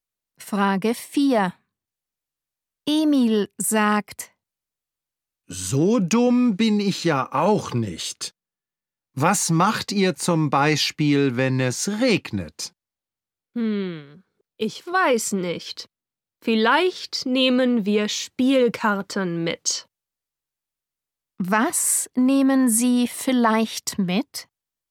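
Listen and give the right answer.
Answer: Spielkarten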